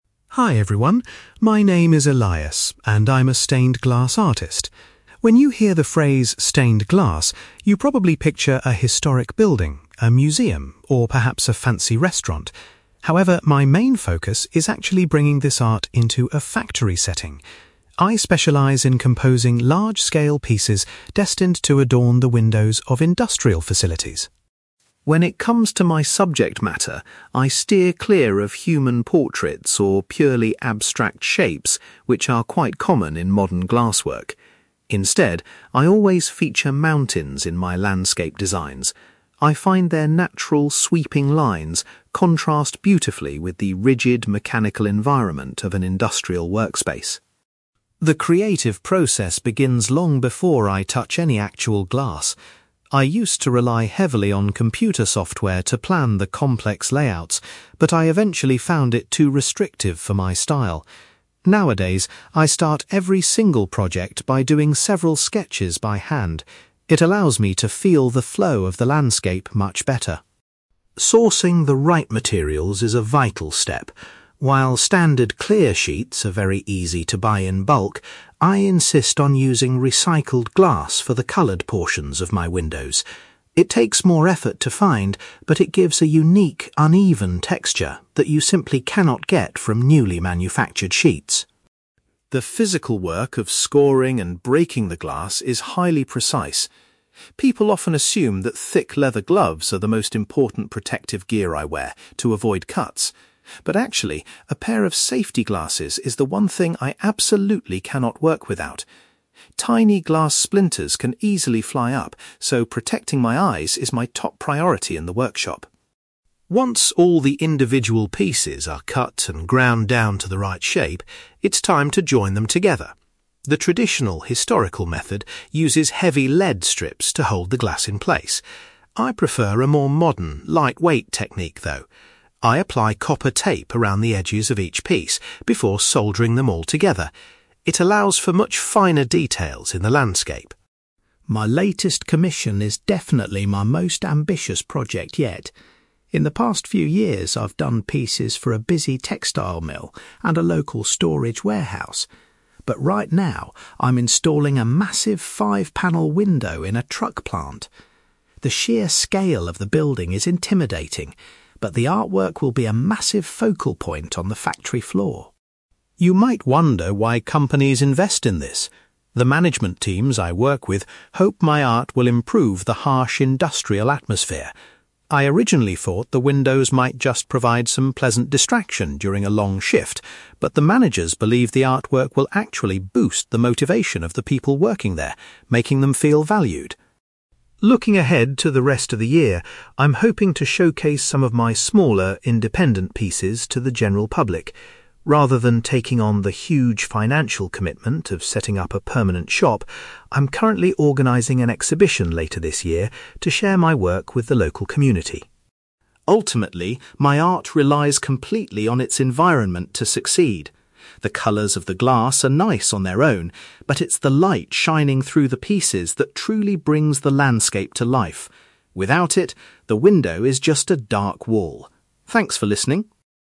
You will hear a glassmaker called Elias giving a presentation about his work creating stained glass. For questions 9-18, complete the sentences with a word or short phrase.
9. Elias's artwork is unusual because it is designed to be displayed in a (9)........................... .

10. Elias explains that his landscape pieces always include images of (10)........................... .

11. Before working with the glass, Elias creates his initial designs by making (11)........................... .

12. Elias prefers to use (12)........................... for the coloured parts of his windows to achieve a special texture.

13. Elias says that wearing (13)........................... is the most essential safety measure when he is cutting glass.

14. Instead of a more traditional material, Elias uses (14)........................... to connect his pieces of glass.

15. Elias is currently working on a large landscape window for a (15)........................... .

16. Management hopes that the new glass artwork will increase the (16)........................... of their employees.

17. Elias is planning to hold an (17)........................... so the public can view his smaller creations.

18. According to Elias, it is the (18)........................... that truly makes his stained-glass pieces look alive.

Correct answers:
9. factory
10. mountains
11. sketches
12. recycled glass
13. safety glasses
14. copper tape
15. truck plant
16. motivation
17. exhibition
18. light

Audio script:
Elias: Hi everyone. My name is Elias, and I'm a stained-glass artist. When you hear the phrase 'stained glass', you probably picture a historic building, a museum, or perhaps a fancy restaurant. However, my main focus is actually bringing this art into a factory setting. I specialize in composing large-scale pieces destined to adorn the windows of industrial facilities.
When it comes to my subject matter, I steer clear of human portraits or purely abstract shapes, which are quite common in modern glasswork. Instead, I always feature mountains in my landscape designs. I find their natural, sweeping lines contrast beautifully with the rigid, mechanical environment of an industrial workspace.
The creative process begins long before I touch any actual glass. I used to rely heavily on computer software to plan the complex layouts, but I eventually found it too restrictive for my style. Nowadays, I start every single project by doing several sketches by hand. It allows me to feel the flow of the landscape much better.
Sourcing the right materials is a vital step. While standard clear sheets are very easy to buy in bulk, I insist on using recycled glass for the coloured portions of my windows. It takes more effort to find, but it gives a unique, uneven texture that you simply cannot get from newly manufactured sheets.
The physical work of scoring and breaking the glass is highly precise. People often assume that thick leather gloves are the most important protective gear I wear, to avoid cuts. But actually, a pair of safety glasses is the one thing I absolutely cannot work without. Tiny glass splinters can easily fly up, so protecting my eyes is my top priority in the workshop.
Once all the individual pieces are cut and ground down to the right shape, it's time to join them together. The traditional historical method uses heavy lead strips to hold the glass in place. I prefer a more modern, lightweight technique, though. I apply copper tape around the edges of each piece before soldering them all together. It allows for much finer details in the landscape.
My latest commission is definitely my most ambitious project yet. In the past few years, I've done pieces for a busy textile mill and a local storage warehouse. But right now, I'm installing a massive, five-panel window in a truck plant. The sheer scale of the building is intimidating, but the artwork will be a massive focal point on the factory floor.
You might wonder why companies invest in this. The management teams I work with hope my art will improve the harsh industrial atmosphere. I originally thought the windows might just provide some pleasant distraction during a long shift, but the managers believe the artwork will actually boost the motivation of the people working there, making them feel valued.
Looking ahead to the rest of the year, I'm hoping to showcase some of my smaller, independent pieces to the general public. Rather than taking on the huge financial commitment of setting up a permanent shop, I'm currently organizing an exhibition later this year to share my work with the local community.
Ultimately, my art relies completely on its environment to succeed. The colours of the glass are nice on their own, but it's the light shining through the pieces that truly brings the landscape to life. Without it, the window is just a dark wall. Thanks for listening!

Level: B2